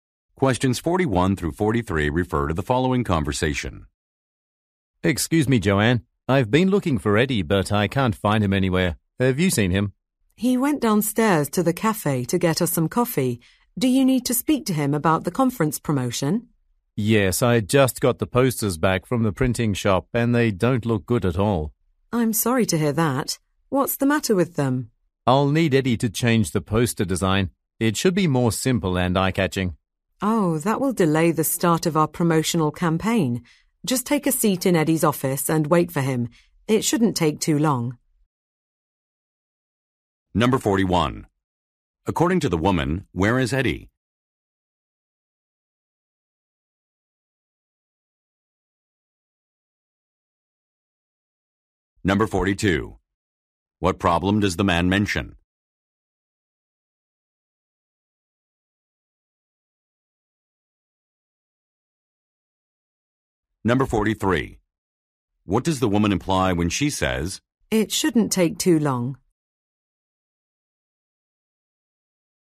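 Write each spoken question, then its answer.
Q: According to the woman, where is Eddie?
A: At the cafe downstairs getting coffee

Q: What problem does the man mention?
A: The posters don't look good

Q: What does the woman imply when she says, It shouldn't take too long?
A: Eddie will be back soon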